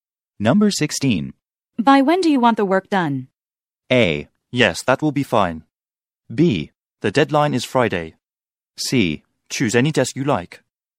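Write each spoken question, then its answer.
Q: By when do you want the work done?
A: B: The deadline is Friday.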